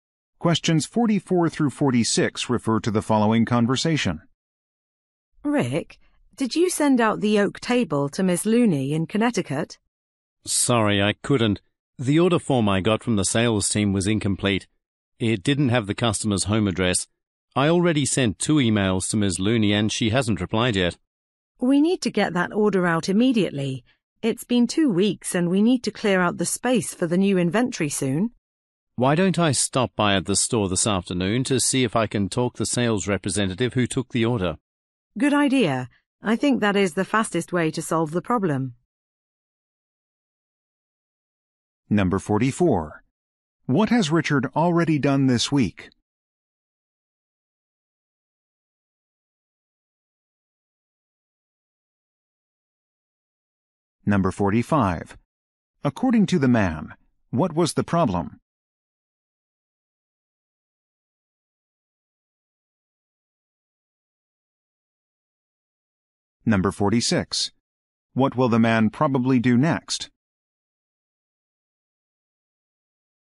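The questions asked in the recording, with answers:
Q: According to the man, what was the problem?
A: The order form was missing the customer's address

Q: What will the man probably do next?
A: Go to the store to talk to the sales representative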